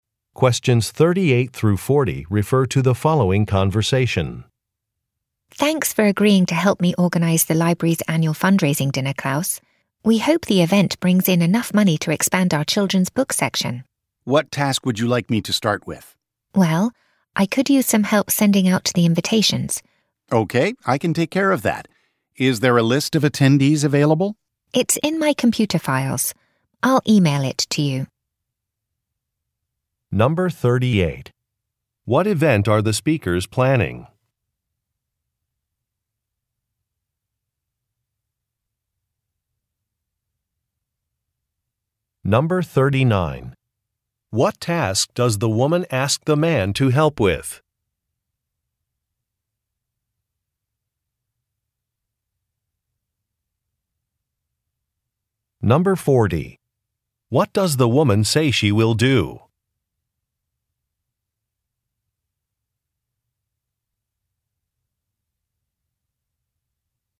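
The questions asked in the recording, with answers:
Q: What event are the speakers planning?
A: A library fundraising dinner

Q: What task does the woman ask the man to help with?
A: Sending out invitations

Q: What does the woman say she will do?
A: Email him the list of attendees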